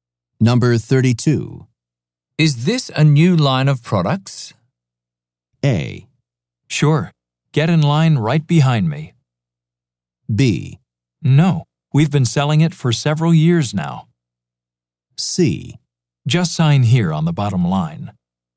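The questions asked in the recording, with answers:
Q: Is this a new line of products?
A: B: No. We've been selling it for several years now.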